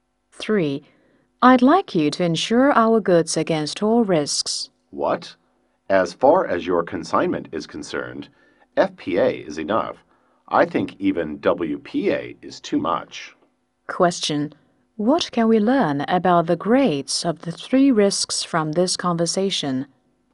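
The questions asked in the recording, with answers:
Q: What can we learn about the grades of the 3 risks from this conversation?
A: All risks covers the most, then WPA, then FPA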